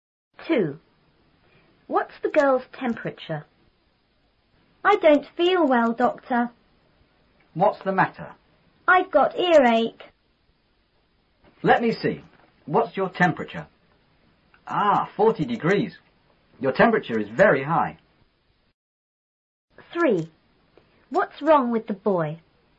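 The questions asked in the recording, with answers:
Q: What's the girl's temperature?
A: 40 degrees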